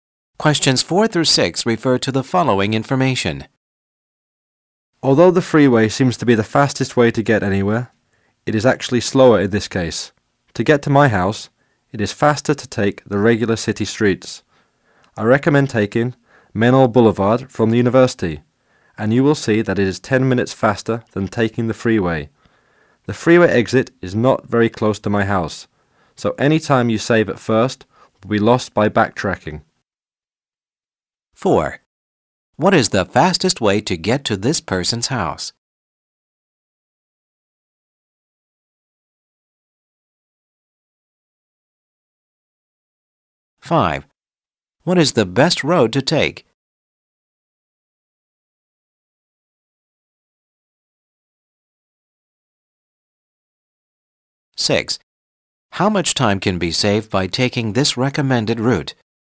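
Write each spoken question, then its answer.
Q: What is the fastest way to get to this person's house?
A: Taking regular city streets

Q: What is the best road to take?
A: Menlo Boulevard

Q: How much time can be saved by taking this recommended route?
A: 10 minutes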